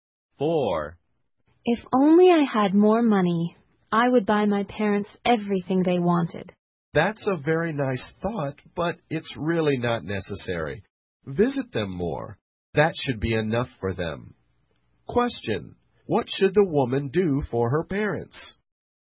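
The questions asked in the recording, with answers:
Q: What should the woman do for her parents?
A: Visit them more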